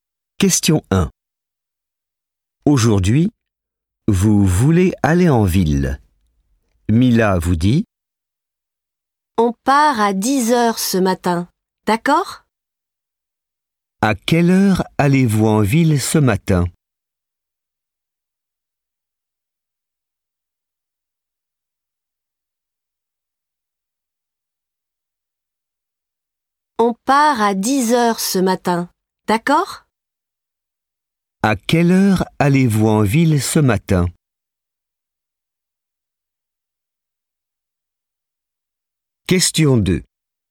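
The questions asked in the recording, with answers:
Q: À quelle heure allez-vous en ville ce matin?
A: À 10 heures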